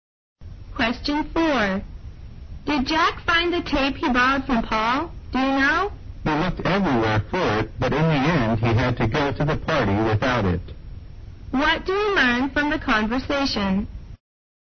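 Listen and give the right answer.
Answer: Jack didn't find the tape and went to the party without it.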